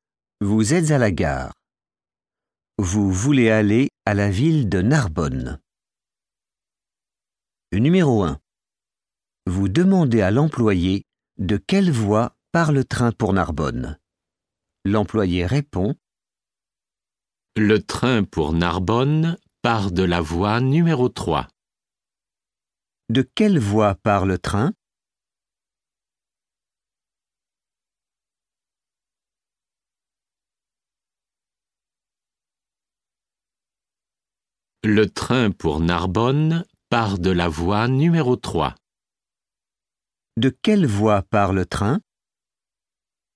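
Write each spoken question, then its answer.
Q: De quelle voie part le train?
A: Voie numéro 3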